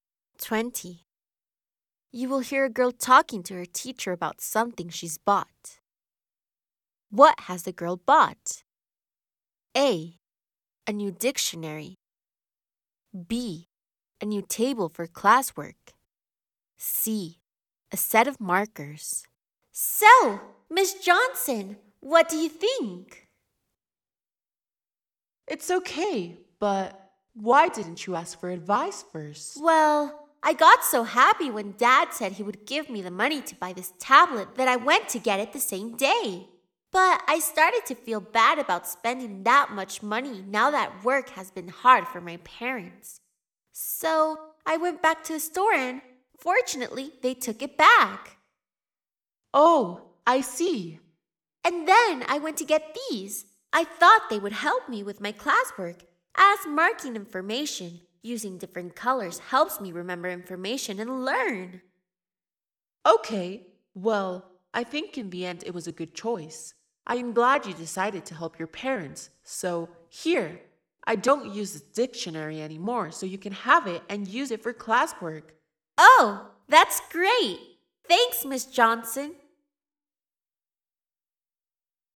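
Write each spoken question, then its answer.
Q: What has the girl bought?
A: C: A set of markers.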